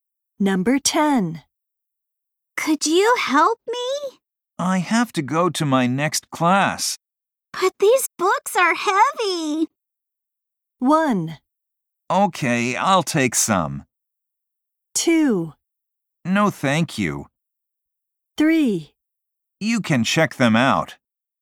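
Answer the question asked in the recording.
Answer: 1: Okay, I'll take some.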